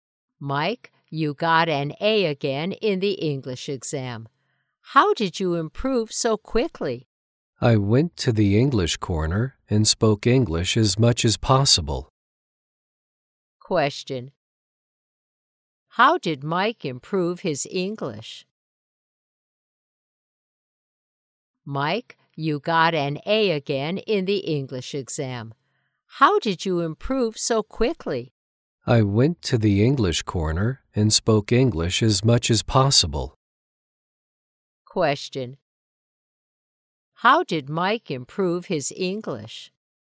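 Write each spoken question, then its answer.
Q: How did Mike improve his English?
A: He went to the English corner and spoke English as much as possible.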